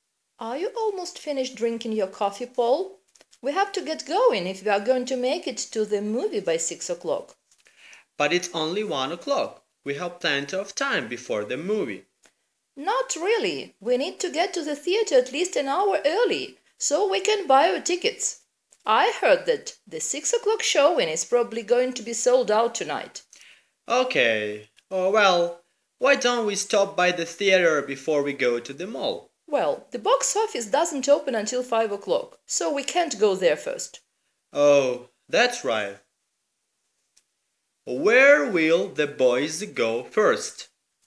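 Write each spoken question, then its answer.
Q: Where will the boys go first?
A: To the mall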